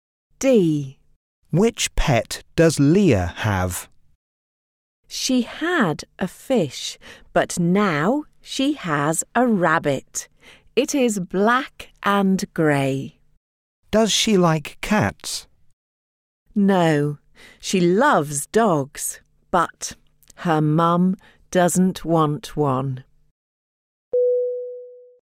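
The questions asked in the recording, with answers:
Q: Which pet does Leah have?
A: A rabbit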